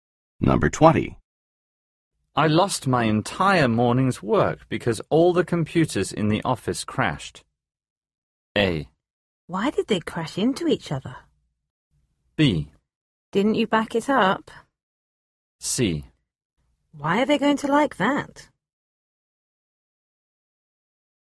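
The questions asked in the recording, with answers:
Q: I lost my entire morning's work because all the computers in the office crashed.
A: B: Didn't you back it up?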